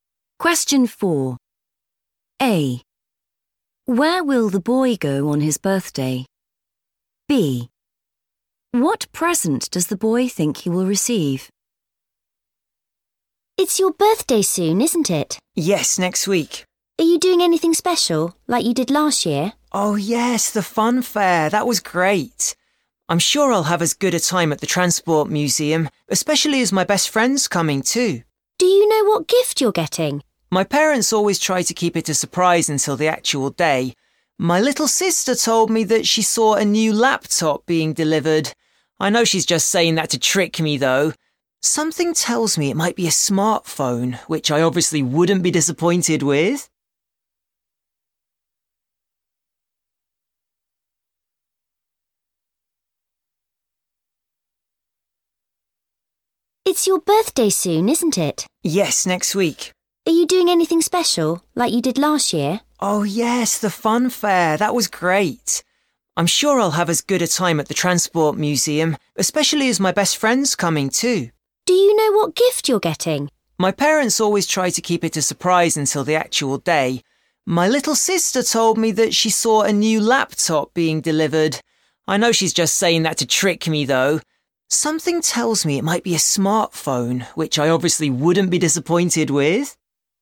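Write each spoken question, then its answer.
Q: Where will the boy go on his birthday?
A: the Transport Museum

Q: What present does the boy think he will receive?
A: a smartphone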